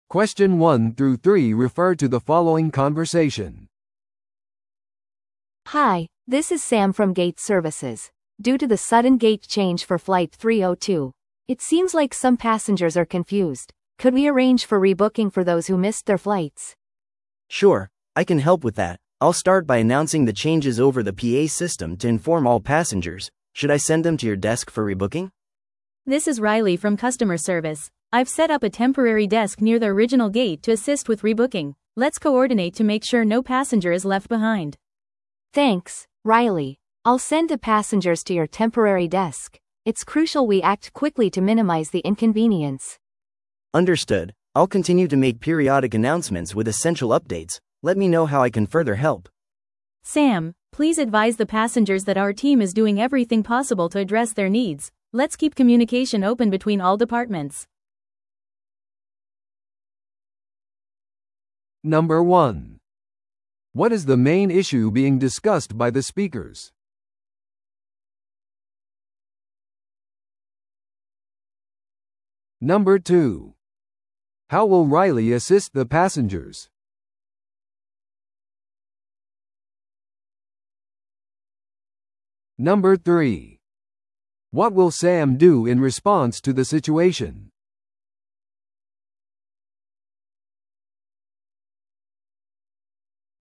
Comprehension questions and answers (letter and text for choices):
Listen to the audio below and answer the questions.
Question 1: What is the main issue being discussed by the speakers?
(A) PAシステムに技術的な問題があった。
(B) ゲート変更により乗客が混乱している。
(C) 手荷物受取所が移動された。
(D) フライト302は無期限に遅延した。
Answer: (B) ゲート変更により乗客が混乱している。

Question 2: How will Riley assist the passengers?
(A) 別のターミナルまでエスコートすることによって。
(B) 待ち時間中のリフレッシュメントを提供することによって。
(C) 予約件数のための臨時デスクを設置することによって。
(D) フライトの遅延に対する補償を提供することによって。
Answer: (C) 予約件数のための臨時デスクを設置することによって。

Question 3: What will Sam do in response to the situation?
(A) 乗客のために新しいフライトスケジュールを準備する。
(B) 乗客をライリーの臨時デスクに案内する。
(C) 影響を受けた乗客に謝罪し、払い戻しを行う。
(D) 搭乗時間を早めるためにパイロットと調整する。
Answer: (B) 乗客をライリーの臨時デスクに案内する。

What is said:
A: Hi, this is Sam from gate services. Due to the sudden gate change for flight 302, it seems like some passengers are confused. Could we arrange for rebooking for those who missed their flights?
B: Sure, I can help with that. I'll start by announcing the changes over the PA system to inform all passengers. Should I send them to your desk for rebooking?
C: This is Riley from customer service. I've set up a temporary desk near the original gate to assist with rebooking. Let's coordinate to make sure no passenger is left behind.
A: Thanks, Riley. I'll send the passengers to your temporary desk. It's crucial we act quickly to minimize the inconvenience.
B: Understood. I'll continue to make periodic announcements with essential updates. Let me know how I can further help.
C: Sam, please advise the passengers that our team is doing everything possible to address their needs. Let's keep communication open between all departments.